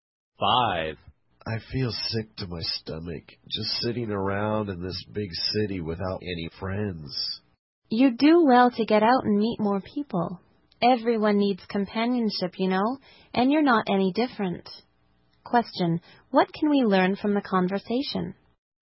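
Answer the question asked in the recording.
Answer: The man is lonely in the big city and needs to meet more people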